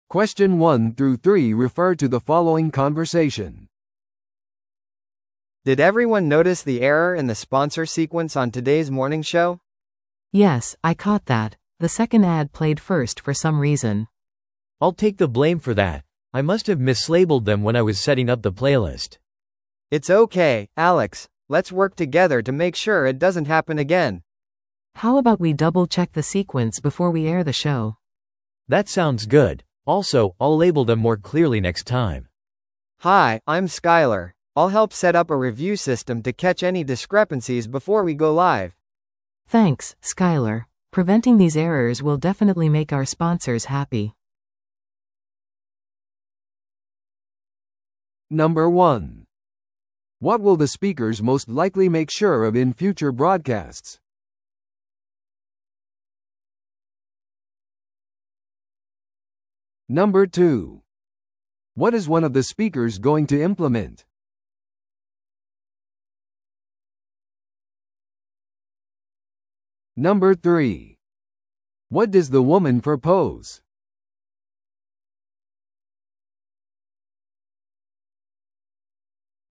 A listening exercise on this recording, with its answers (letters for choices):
Listen to the audio below and answer the questions.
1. What will the speakers most likely make sure of in future broadcasts?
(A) 広告がはっきりとラベル付けされていること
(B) 朝の番組が時間通りに始まること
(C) プレイリストにすべての曲が含まれていること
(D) Alexが朝の番組をホストすること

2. What is one of the speakers going to implement?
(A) 自動再生システム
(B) スポンサー感謝イベント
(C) 新しい朝の番組フォーマット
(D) 放送順序をレビューするシステム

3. What does the woman propose?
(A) 朝の番組の全スクリプトをチェックする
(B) リスナーからの生のフィードバックを監視する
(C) 放送前に広告の順序を確認する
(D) 新しいスタッフに放送操作をトレーニングする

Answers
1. A
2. D
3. C

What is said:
A: Did everyone notice the error in the sponsor sequence on today's morning show?
B: Yes, I caught that. The second ad played first for some reason.
C: I'll take the blame for that, I must have mislabeled them when I was setting up the playlist.
A: It's okay, Alex. Let's work together to make sure it doesn't happen again.
B: How about we double-check the sequence before we air the show?
C: That sounds good. Also, I'll label them more clearly next time.
A: Hi, I'm Skyler. I'll help set up a review system to catch any discrepancies before we go live.
Preventing these errors will definitely make our sponsors happy.